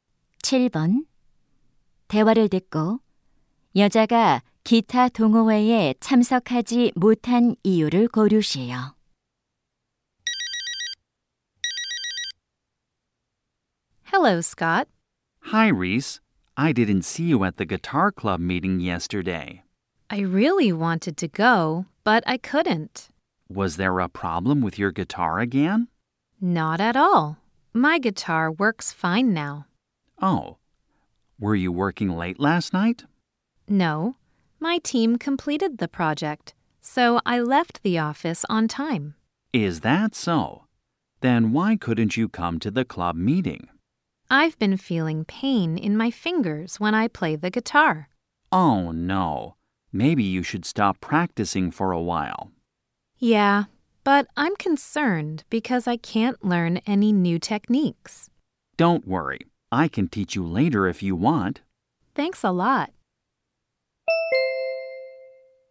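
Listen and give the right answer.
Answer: 기타를 칠 때 손가락이 아파서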